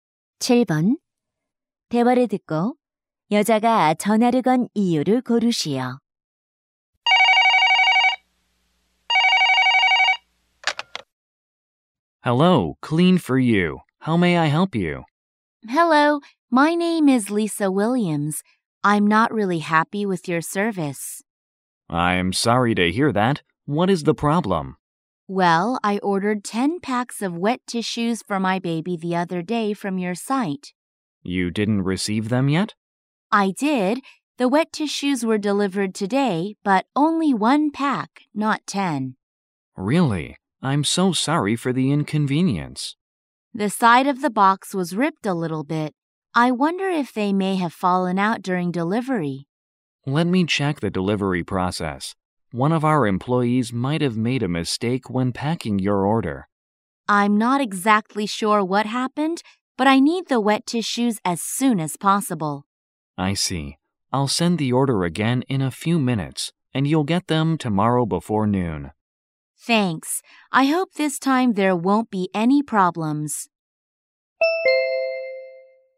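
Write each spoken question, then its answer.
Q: 대화를 듣고 여자가 전화를 건 이유를 고르시오.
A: 주문한 물티슈 10팩 중 1팩만 배송되어서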